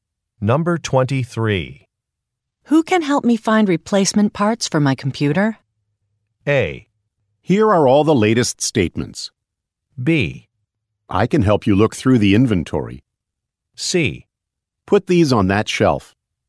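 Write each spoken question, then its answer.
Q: Who can help me find replacement parts for my computer?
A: B: I can help you look through the inventory.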